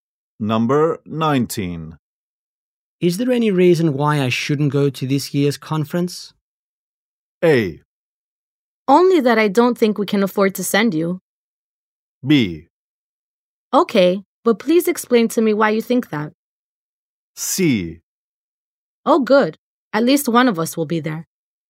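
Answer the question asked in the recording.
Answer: A: Only that I don't think we can afford to send you.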